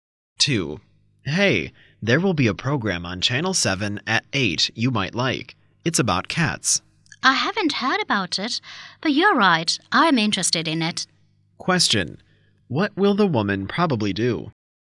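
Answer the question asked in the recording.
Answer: Watch the program about cats on Channel 7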